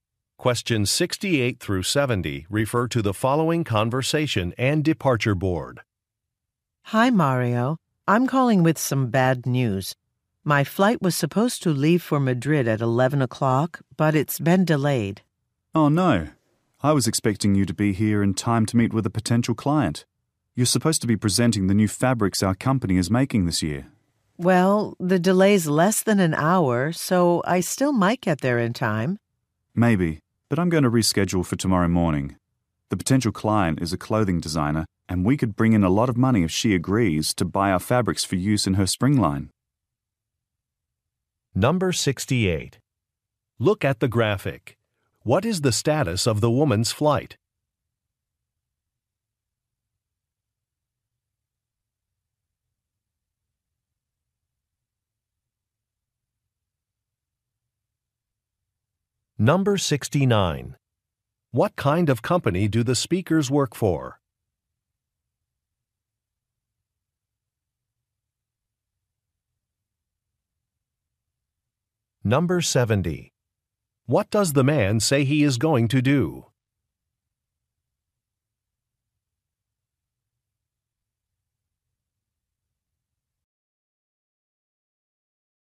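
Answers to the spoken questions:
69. A fabric manufacturer
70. Reschedule the meeting for tomorrow morning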